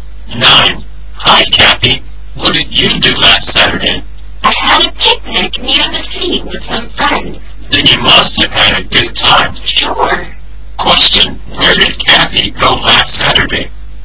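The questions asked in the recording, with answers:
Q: Question, where did Kathy go last Saturday?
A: Near the sea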